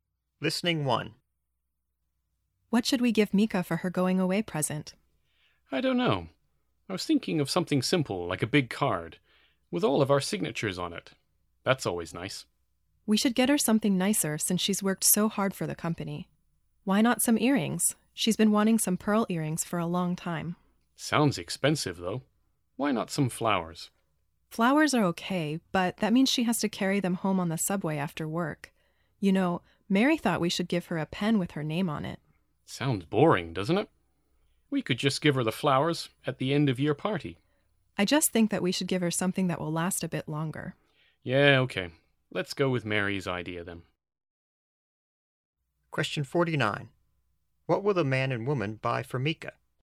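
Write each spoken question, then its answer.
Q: What will the man and woman buy for Mika?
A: A pen with her name on it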